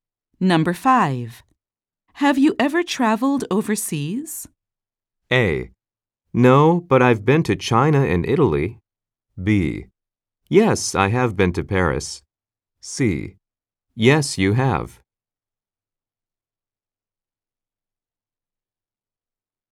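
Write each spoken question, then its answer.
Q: Have you ever traveled overseas?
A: B: Yes, I have been to Paris.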